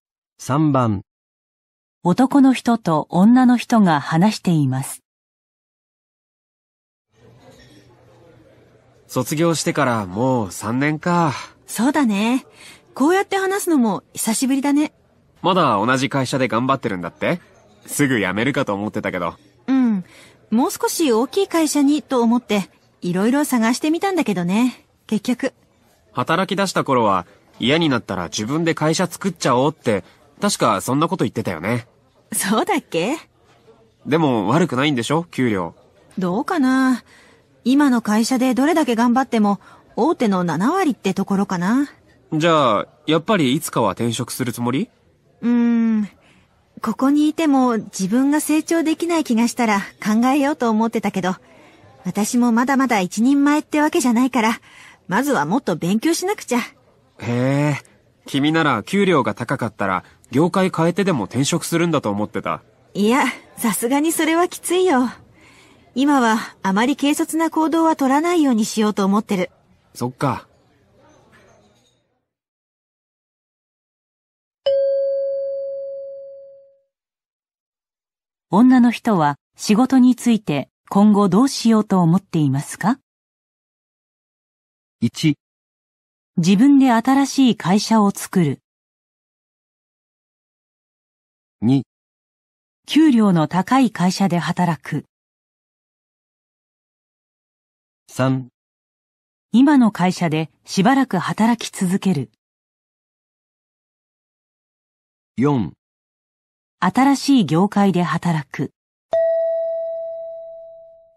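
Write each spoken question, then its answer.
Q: 女の人は仕事について今後どうしようと思っていますか?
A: 3: 今の会社でしばらく働き続ける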